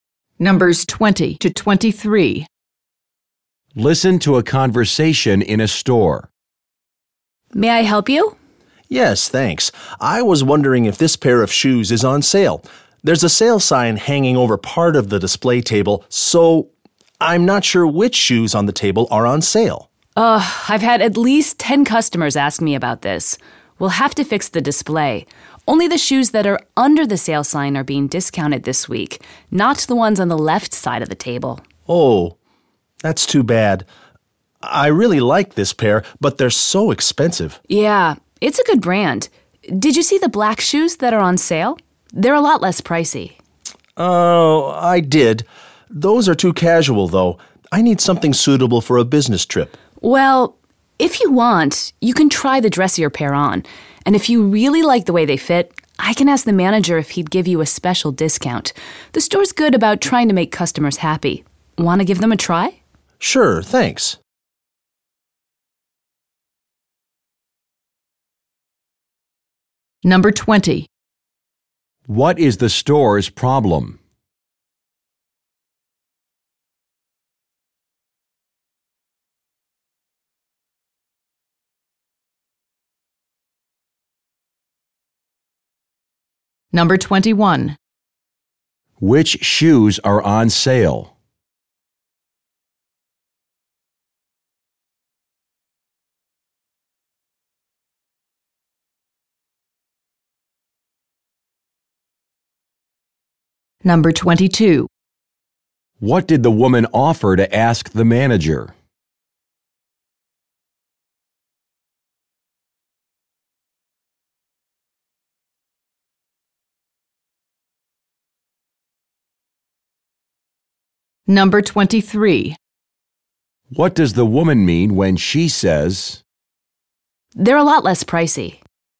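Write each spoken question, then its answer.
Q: What is the store's problem?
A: The sale sign over the display is confusing customers about which shoes are on sale.

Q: Which shoes are on sale?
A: Only the shoes under the sale sign, not those on the left side of the table.

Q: What did the woman offer to ask the manager?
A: Whether he would give the customer a special discount.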